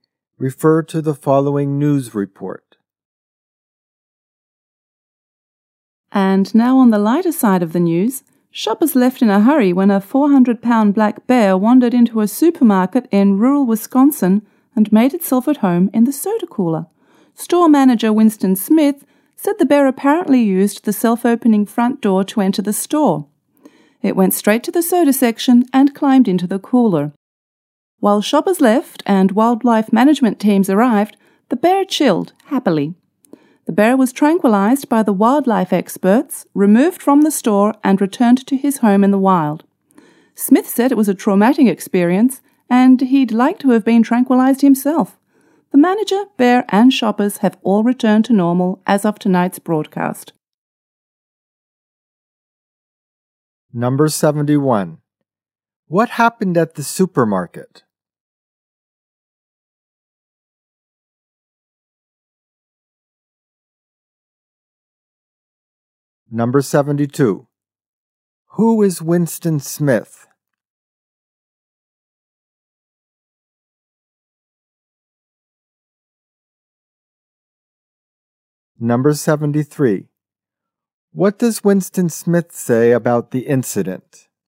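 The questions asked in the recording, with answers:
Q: What happened at the supermarket?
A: A bear wandered in and climbed into the soda cooler

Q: Who is Winston Smith?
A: The store manager

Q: What does Winston Smith say about the incident?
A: It was traumatic; he'd like to have been tranquilized himself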